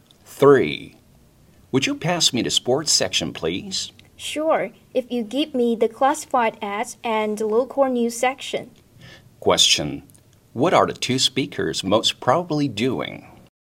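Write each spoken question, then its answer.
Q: What are the two speakers most probably doing?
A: Reading a newspaper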